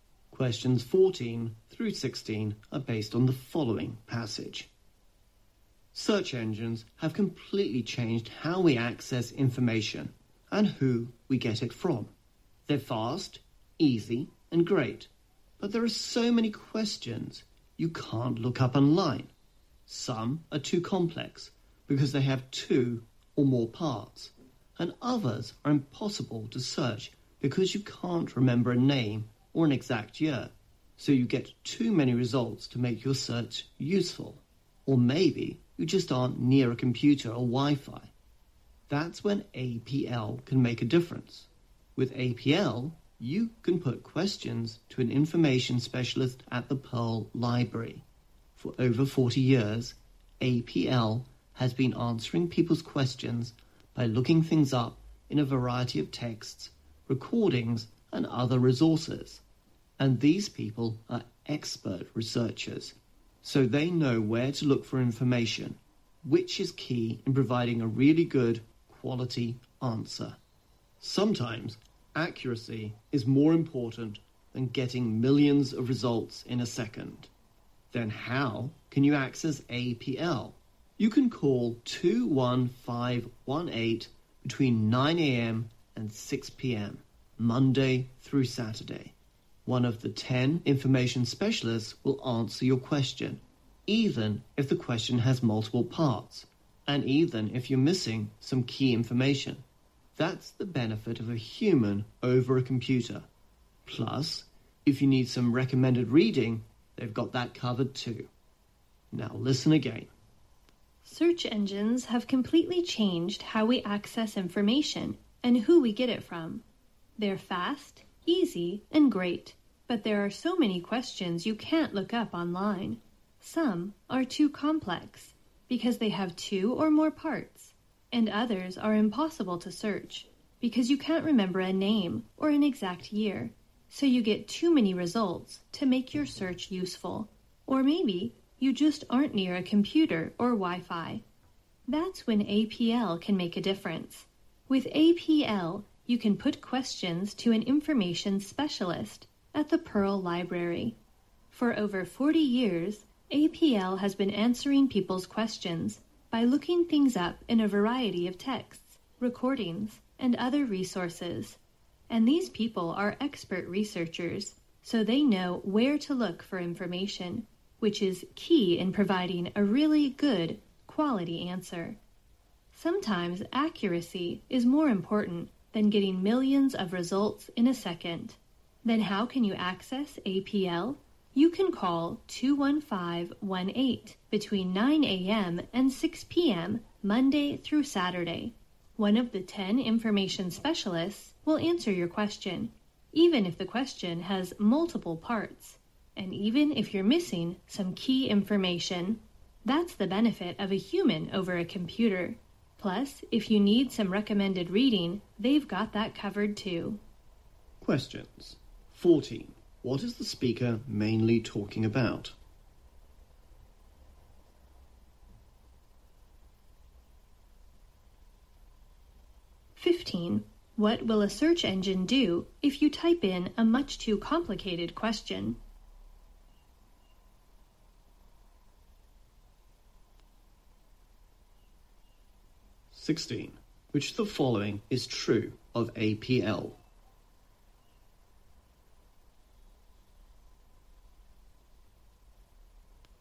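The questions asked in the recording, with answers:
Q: What is the speaker mainly talking about?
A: APL, a library service that answers questions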